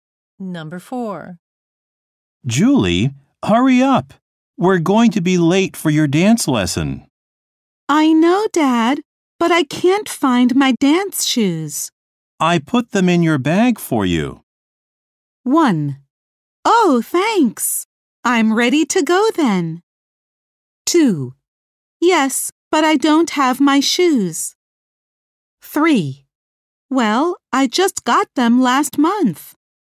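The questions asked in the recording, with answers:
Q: I put them in your bag for you.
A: 1: Oh, thanks.I'm ready to go then.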